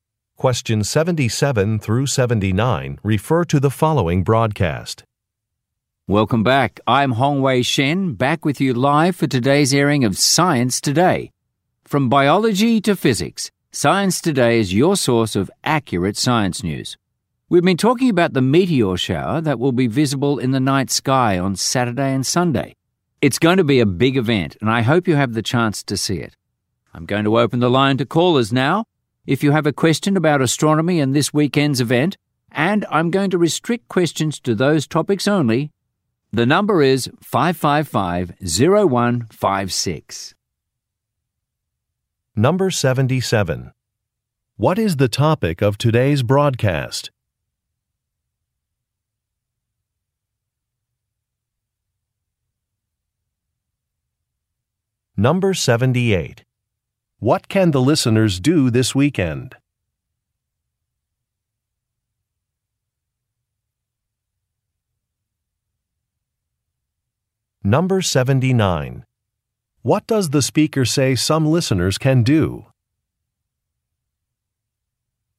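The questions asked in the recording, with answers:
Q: What is the topic of today's broadcast?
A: Science news

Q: What can the listeners do this weekend?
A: See a meteor shower

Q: What does the speaker say some listeners can do?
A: Call in with questions about astronomy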